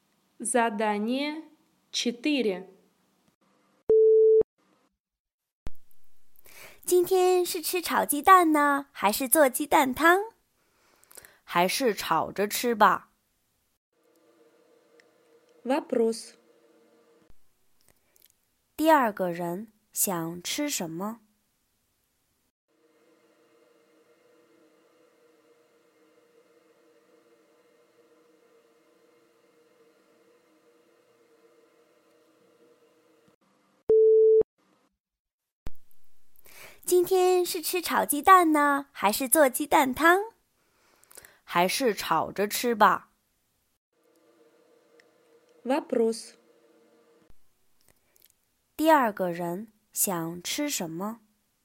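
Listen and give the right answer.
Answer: 炒鸡蛋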